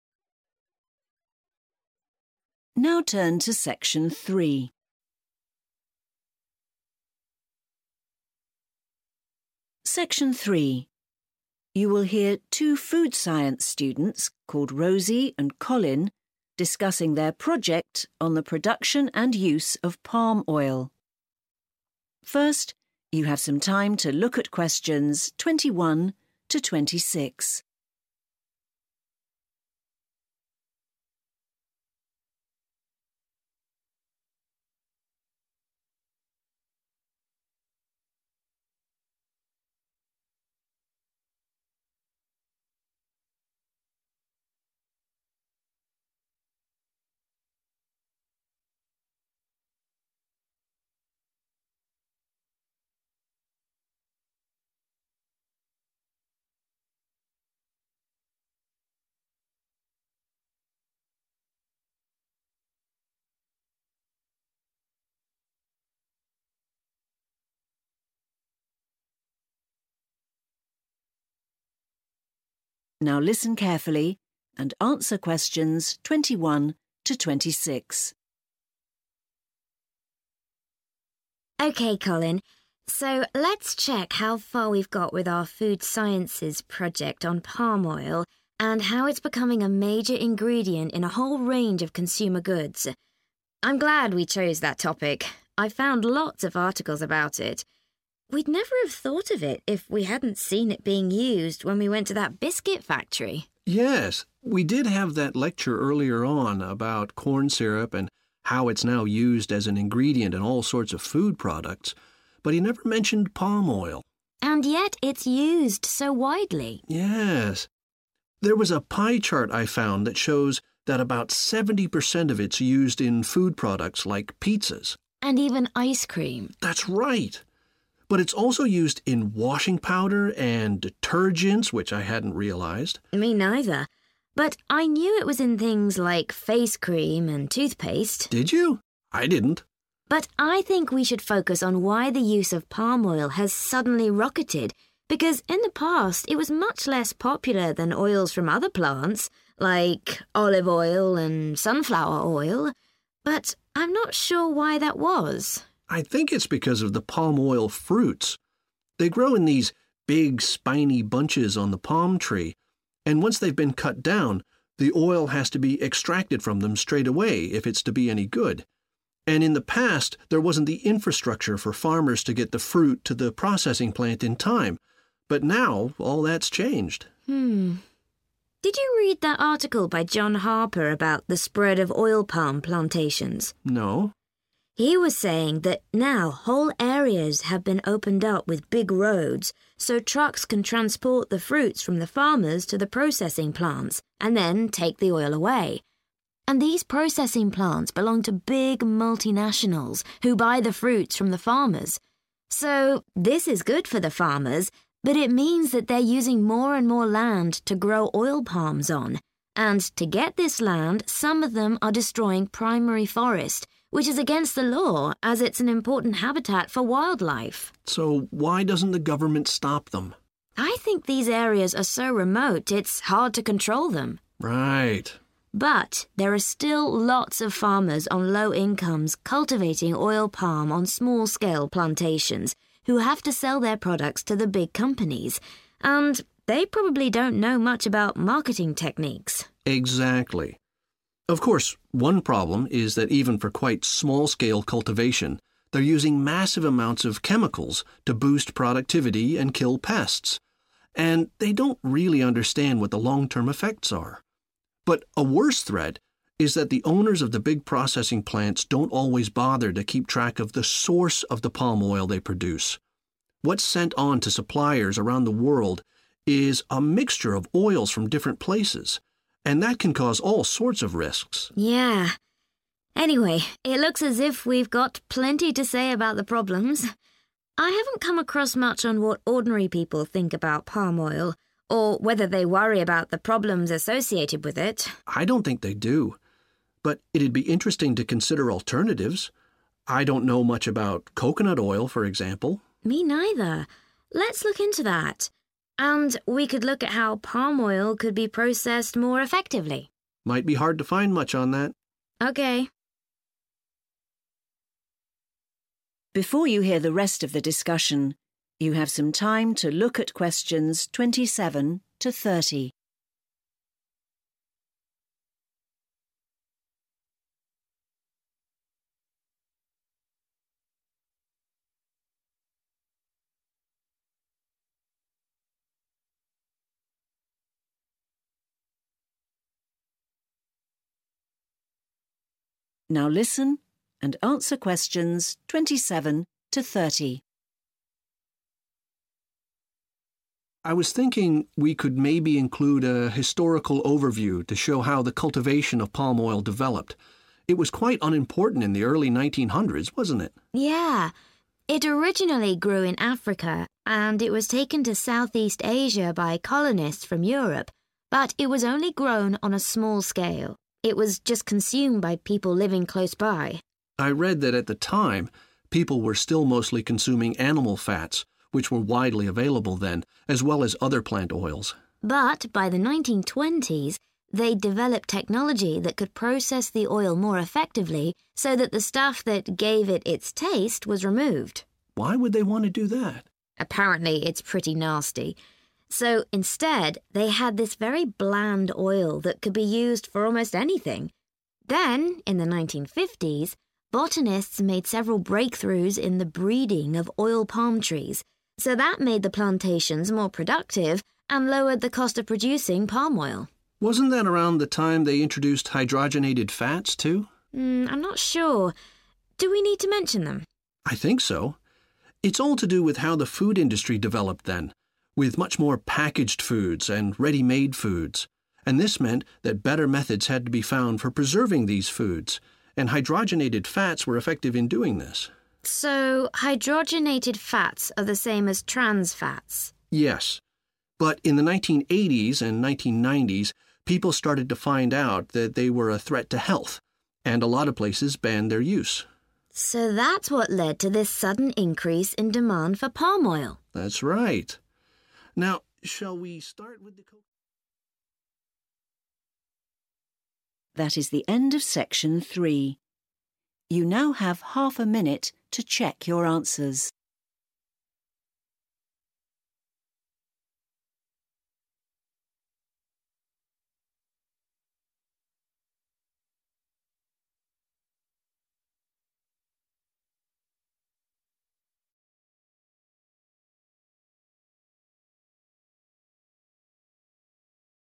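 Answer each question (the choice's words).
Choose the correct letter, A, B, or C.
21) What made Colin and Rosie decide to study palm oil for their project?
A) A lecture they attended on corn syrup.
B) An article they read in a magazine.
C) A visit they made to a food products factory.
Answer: A visit they made to a food products factory.

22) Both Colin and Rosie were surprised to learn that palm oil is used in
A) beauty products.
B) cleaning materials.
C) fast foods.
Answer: cleaning materials.

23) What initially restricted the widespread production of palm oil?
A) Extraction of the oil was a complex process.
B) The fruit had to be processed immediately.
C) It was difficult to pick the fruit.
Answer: The fruit had to be processed immediately.

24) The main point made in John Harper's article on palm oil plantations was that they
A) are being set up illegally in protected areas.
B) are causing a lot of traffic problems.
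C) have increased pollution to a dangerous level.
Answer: are being set up illegally in protected areas.

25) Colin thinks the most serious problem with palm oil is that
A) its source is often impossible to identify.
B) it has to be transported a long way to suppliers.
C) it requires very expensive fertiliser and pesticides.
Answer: its source is often impossible to identify.

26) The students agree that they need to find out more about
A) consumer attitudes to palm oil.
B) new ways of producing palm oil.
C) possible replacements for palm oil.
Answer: possible replacements for palm oil.

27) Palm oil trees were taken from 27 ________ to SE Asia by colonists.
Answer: Africa

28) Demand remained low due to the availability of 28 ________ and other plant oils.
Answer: animal fats

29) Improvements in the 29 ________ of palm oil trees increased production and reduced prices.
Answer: breeding

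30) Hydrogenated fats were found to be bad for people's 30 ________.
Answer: health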